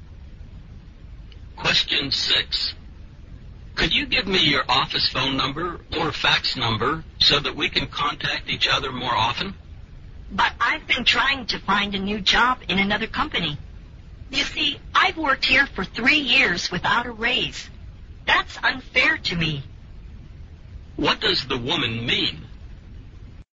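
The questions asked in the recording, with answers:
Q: What does the woman mean?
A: She is planning to leave her company for a new job because she hasn't had a raise.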